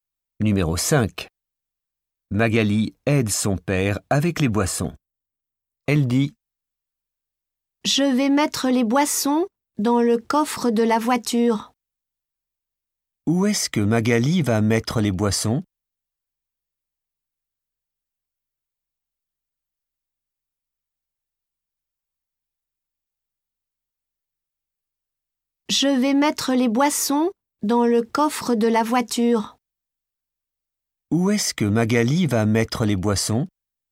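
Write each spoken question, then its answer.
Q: Où est-ce que Magali va mettre les boissons ?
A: dans le coffre de la voiture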